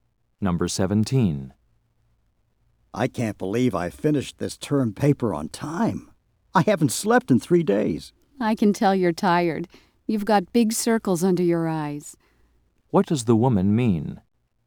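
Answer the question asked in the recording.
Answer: The man looks tired.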